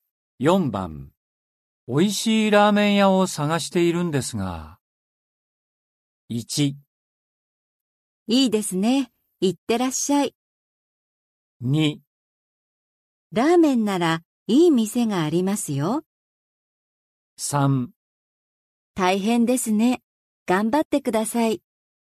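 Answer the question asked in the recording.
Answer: 2: ラーメンならいい店がありますよ。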